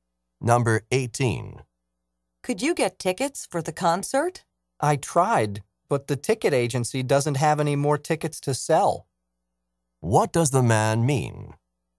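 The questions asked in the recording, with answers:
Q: What does the man mean?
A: He couldn't get tickets; they were sold out.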